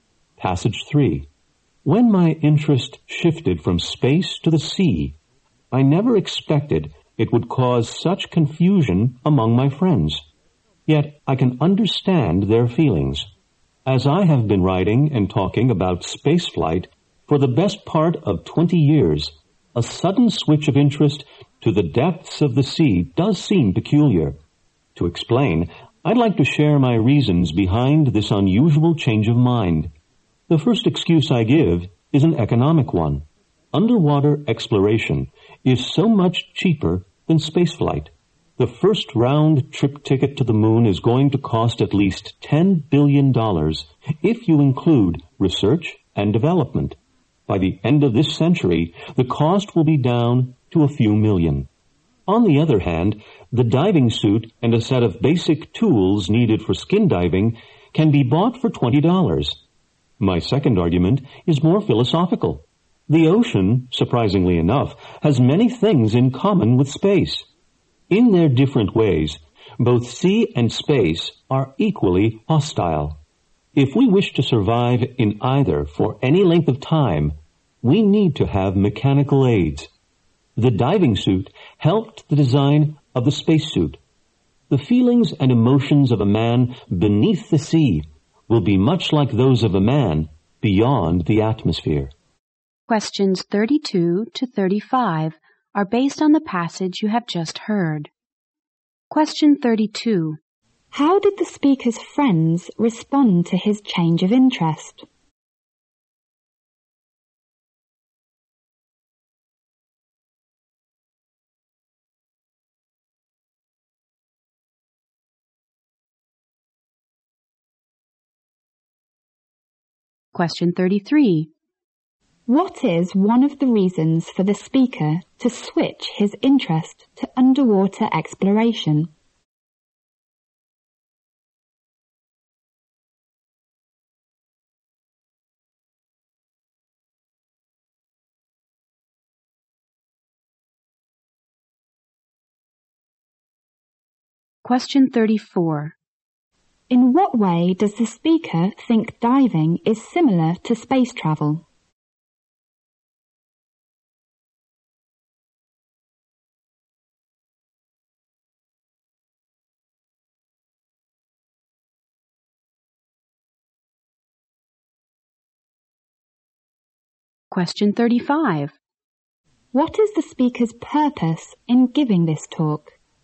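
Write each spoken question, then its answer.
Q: How did the speaker's friends respond to his change of interest?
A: They were confused

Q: What is one of the reasons for the speaker to switch his interest to underwater exploration?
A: Underwater exploration is much cheaper than spaceflight

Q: In what way does the speaker think diving is similar to space travel?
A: Both environments are hostile and need mechanical aids to survive

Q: What is the speaker's purpose in giving this talk?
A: To explain why he switched his interest from space to the sea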